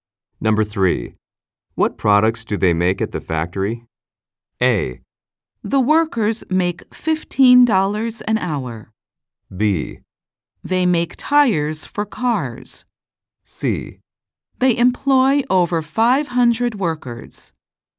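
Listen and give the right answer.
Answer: B: They make tires for cars.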